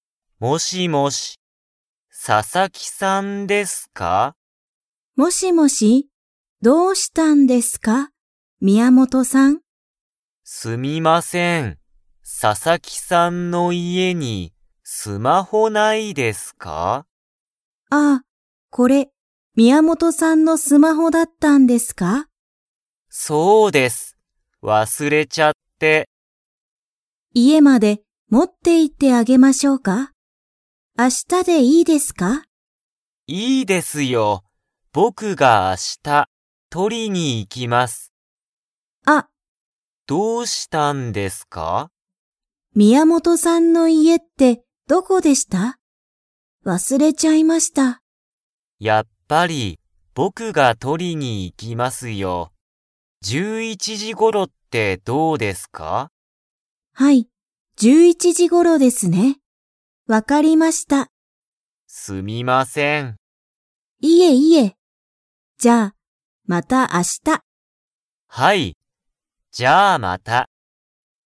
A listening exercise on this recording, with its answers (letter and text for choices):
Comprehension Quiz (Skip if you don't understand the conversation yet)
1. 宮本(みやもと)さんは、佐々木(ささき)さんの____にスマホを忘(わす)れた。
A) 学校(がっこう)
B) 家(いえ)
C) 会社(かいしゃ)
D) 大学(だいがく)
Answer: B) 家(いえ)

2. 宮本(みやもと)さんは、スマホを明日(あした)取(と)りに行(い)きますか?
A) はい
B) いいえ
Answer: A) はい

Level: Level 2